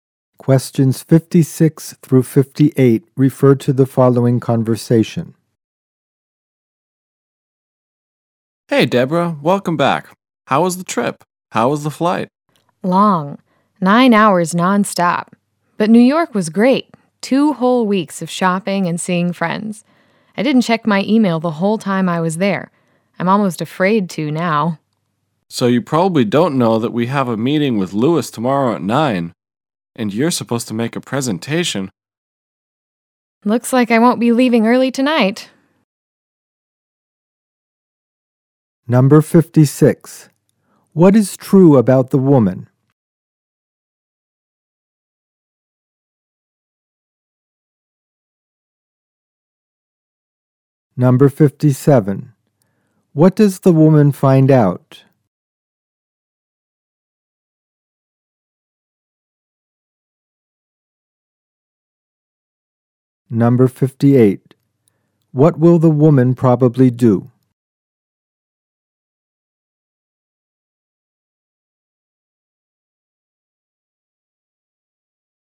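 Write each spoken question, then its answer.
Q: What is true about the woman?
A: She just came back from two weeks in New York

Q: What does the woman find out?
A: She has to give a presentation at a meeting with Lewis tomorrow at 9

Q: What will the woman probably do?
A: Stay late at work tonight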